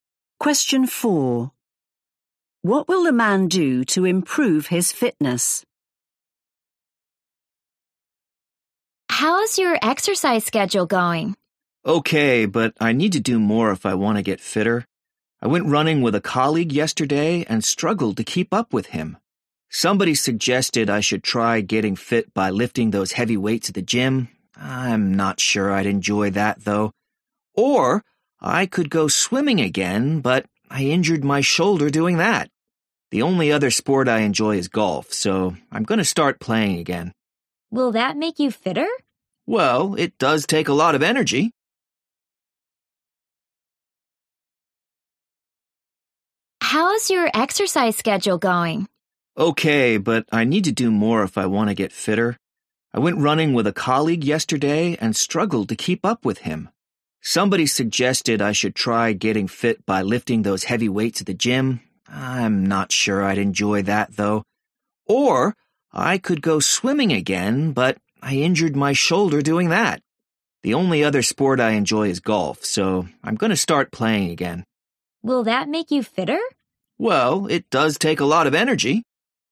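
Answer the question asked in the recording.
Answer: start playing golf again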